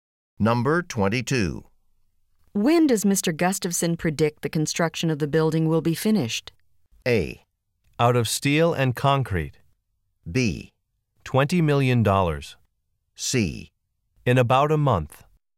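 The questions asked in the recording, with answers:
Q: When does Mr. Gustafson predict the construction of the building will be finished?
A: C: In about a month.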